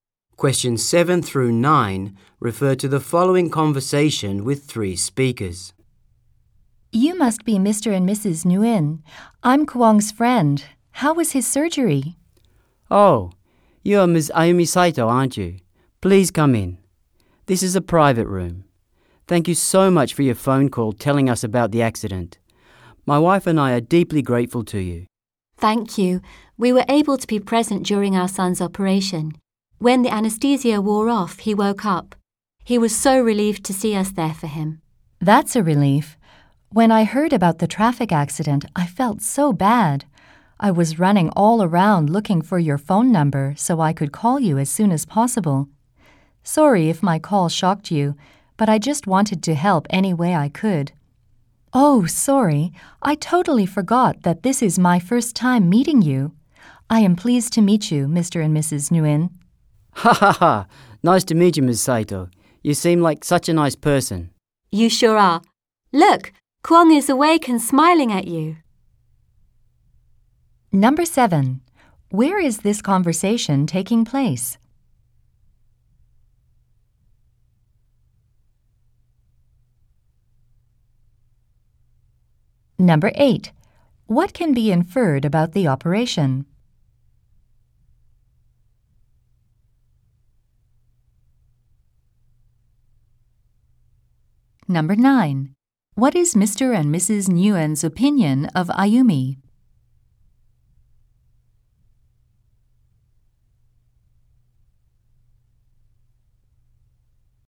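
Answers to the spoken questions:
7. In a private hospital room
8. It went well; Kwong woke up and is recovering
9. They think she is a very nice person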